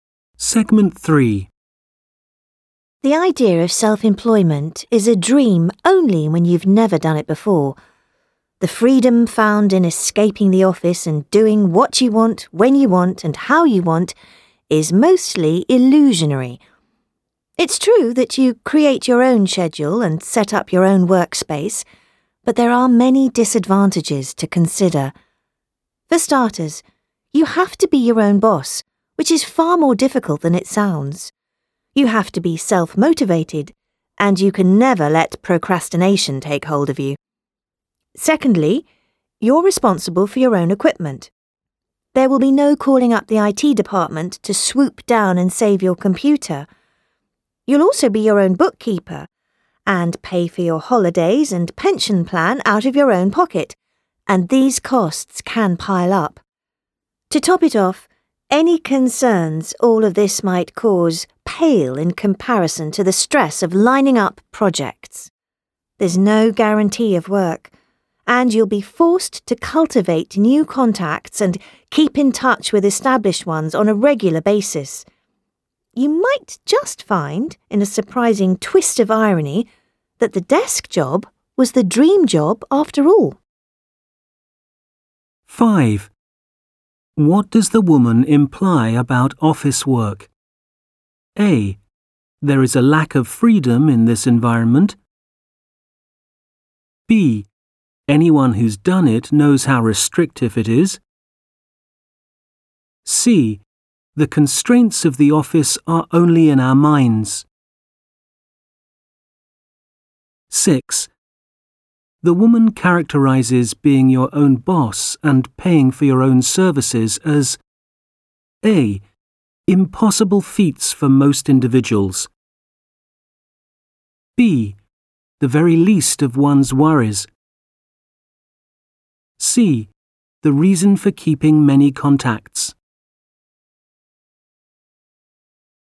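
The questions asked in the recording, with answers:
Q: The woman characterizes being your own boss and paying for your own services as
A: B: The very least of one's worries.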